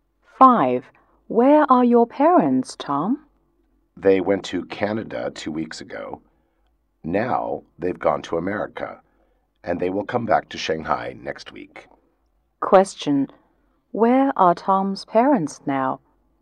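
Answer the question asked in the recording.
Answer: In America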